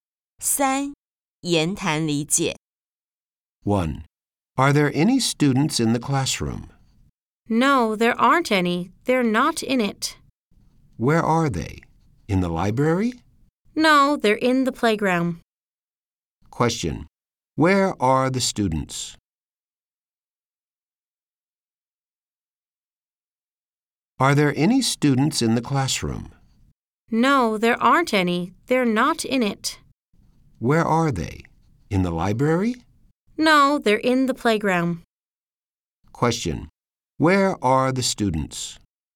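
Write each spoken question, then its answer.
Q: Question. Where are the students?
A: In the playground.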